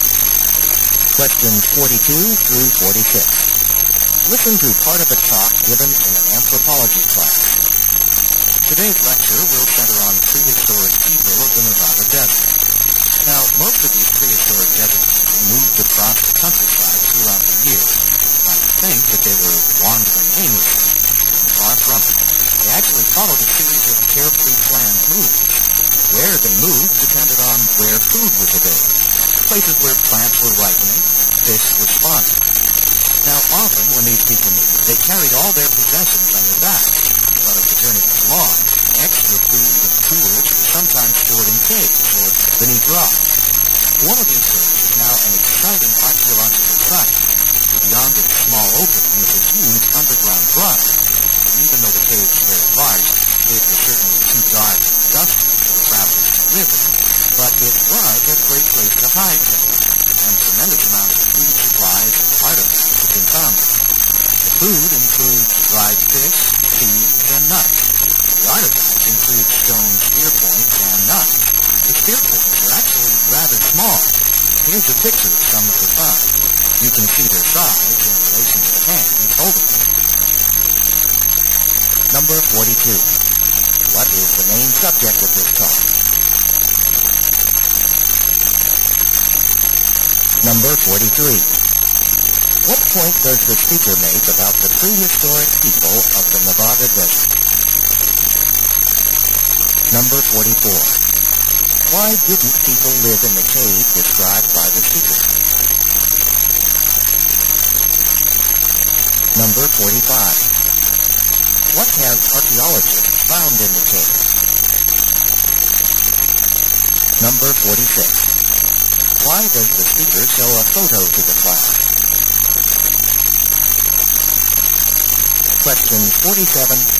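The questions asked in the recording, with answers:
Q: What is the main subject of this talk?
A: Prehistoric people of the Nevada Desert

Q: What point does the speaker make about the prehistoric people of the Nevada Desert?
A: They followed carefully planned moves depending on where food was

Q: Why didn't people live in the cave described by the speaker?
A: It was too dark and dusty

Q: What have archaeologists found in the cave?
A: Food supplies and artifacts such as dried fish, seeds, nuts and spear points

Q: Why does the speaker show a photo to the class?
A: To show the size of the spear points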